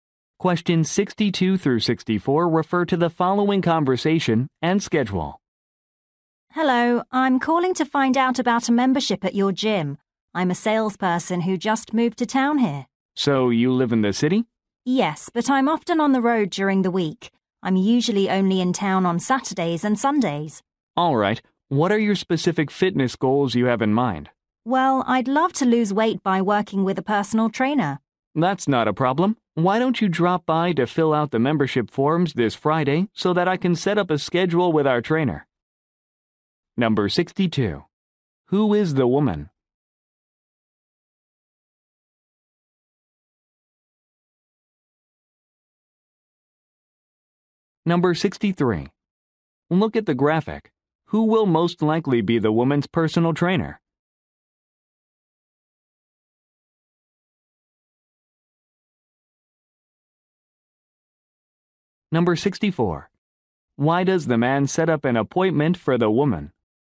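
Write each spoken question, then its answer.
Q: Who is the woman?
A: A salesperson who just moved to town

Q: Why does the man set up an appointment for the woman?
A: To fill out membership forms and set up a schedule with a trainer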